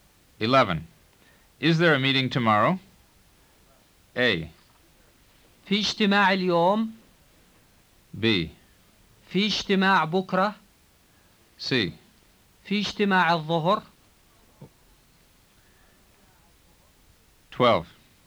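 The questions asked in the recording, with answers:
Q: Is there a meeting tomorrow?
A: B: في اجتماع بكرة.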